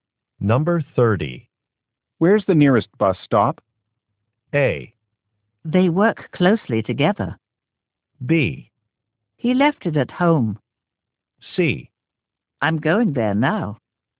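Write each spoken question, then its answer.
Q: Where's the nearest bus stop?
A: C: I'm going there now.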